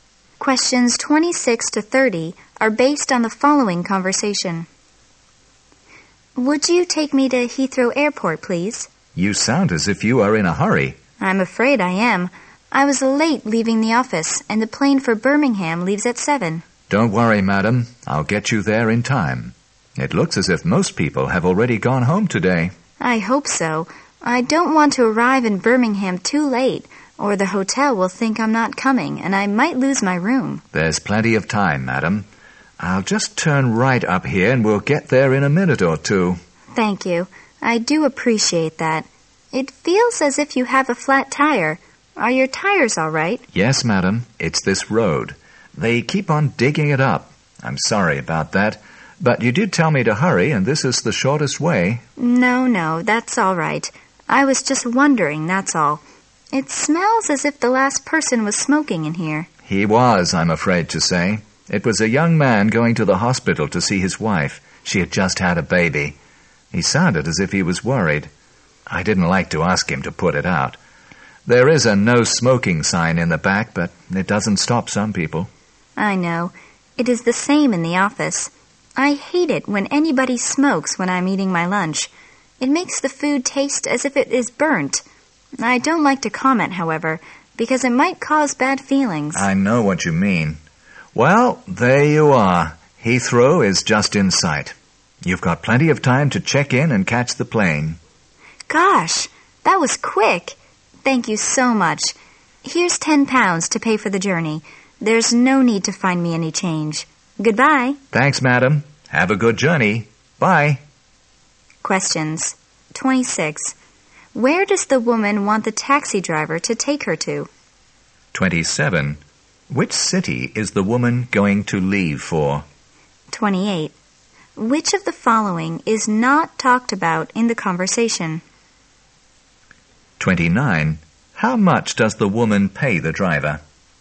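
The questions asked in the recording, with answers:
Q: Where does the woman want the taxi driver to take her to?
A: Heathrow Airport

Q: Which city is the woman going to leave for?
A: Birmingham

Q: How much does the woman pay the driver?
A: £10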